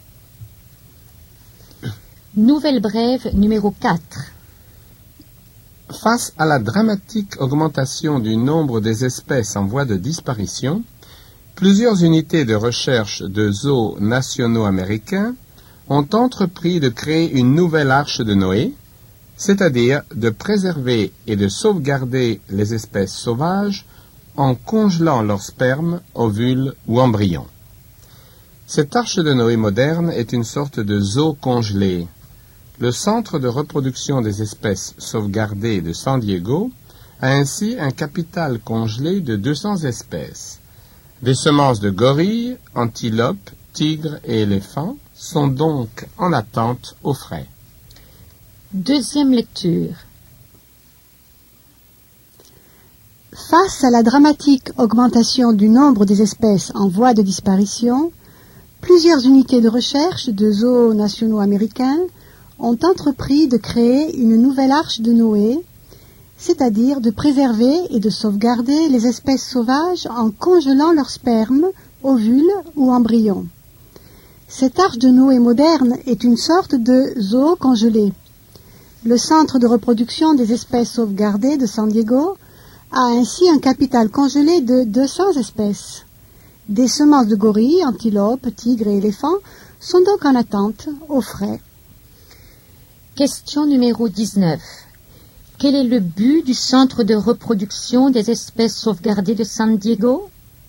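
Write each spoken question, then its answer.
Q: Quel est le but du Centre de reproduction des espèces sauvegardées de San Diego?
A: Sauvegarder les espèces menacées en congelant leurs spermes, ovules ou embryons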